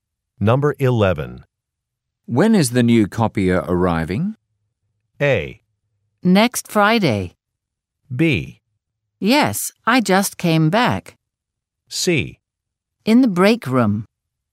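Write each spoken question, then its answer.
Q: When is the new copier arriving?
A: A: Next Friday.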